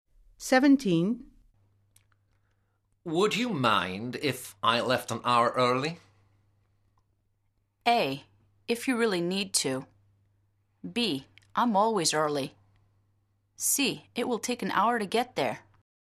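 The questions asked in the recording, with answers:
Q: Would you mind if I left an hour early?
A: A: If you really need to.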